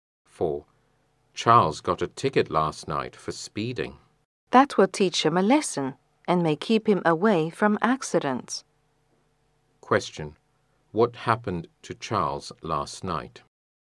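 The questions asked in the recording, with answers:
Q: What happened to Charles last night?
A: He got a ticket for speeding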